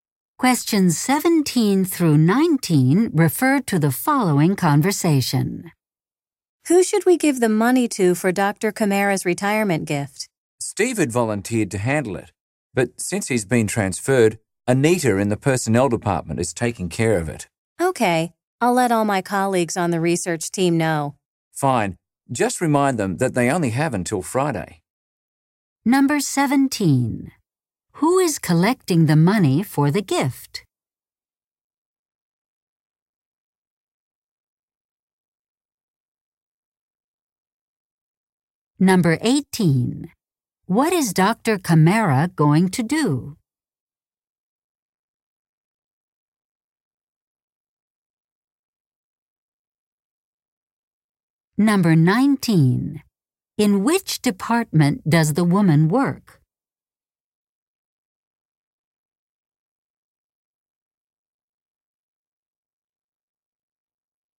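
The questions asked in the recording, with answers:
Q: Who is collecting the money for the gift?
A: Anita

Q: What is Dr. Kamara going to do?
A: Retire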